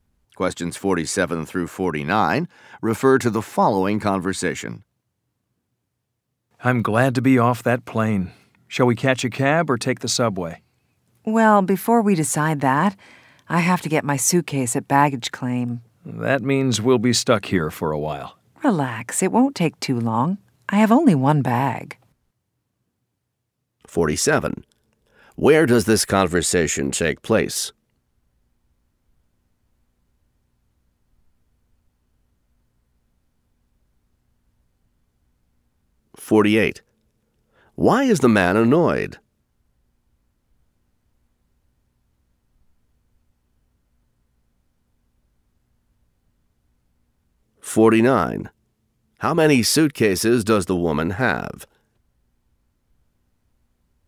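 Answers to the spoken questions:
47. At the airport
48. They will be stuck waiting for baggage
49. One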